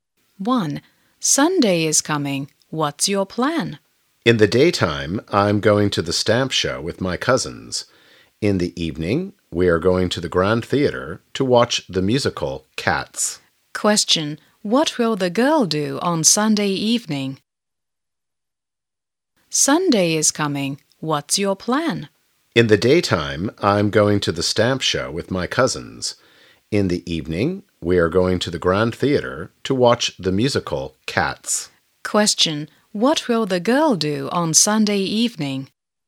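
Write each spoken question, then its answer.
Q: What will the girl do on Sunday evening?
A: Watch the musical Cats at the Grand Theater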